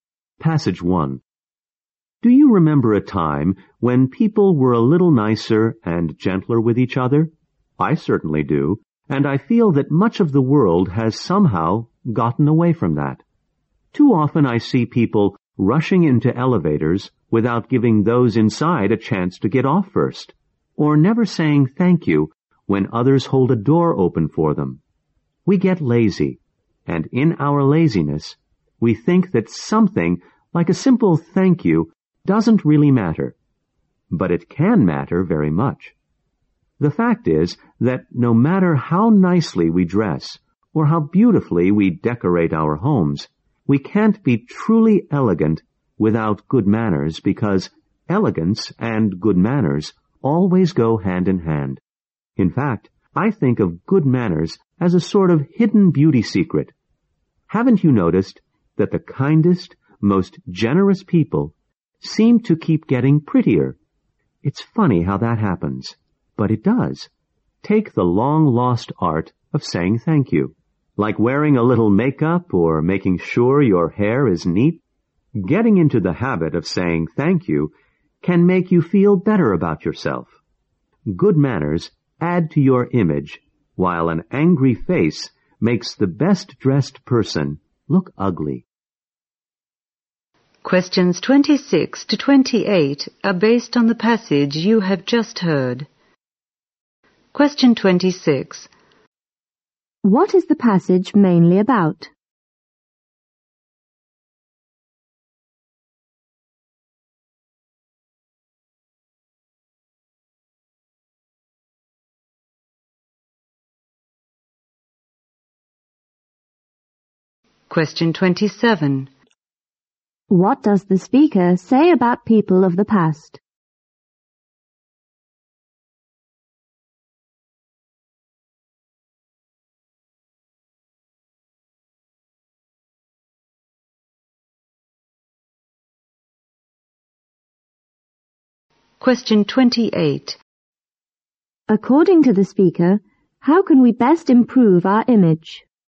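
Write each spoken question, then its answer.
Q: What is the passage mainly about?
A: The importance of good manners.

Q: What does the speaker say about people of the past?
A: They were nicer and gentler with each other.

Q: According to the speaker, how can we best improve our image?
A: By having good manners, such as saying thank you.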